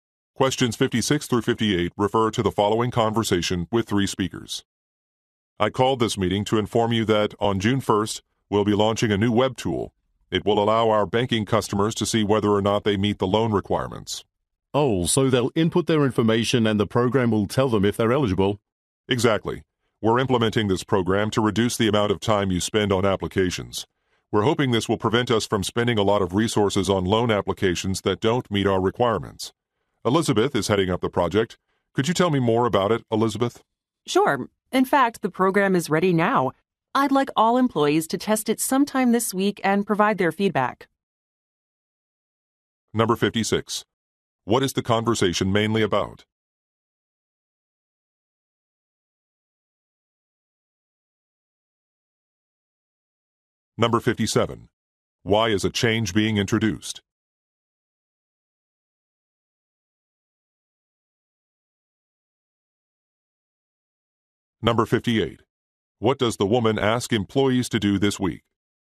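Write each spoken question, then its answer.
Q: What is the conversation mainly about?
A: A new web tool for checking loan eligibility

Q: Why is a change being introduced?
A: To reduce time spent on loan applications

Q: What does the woman ask employees to do this week?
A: Test the program and give feedback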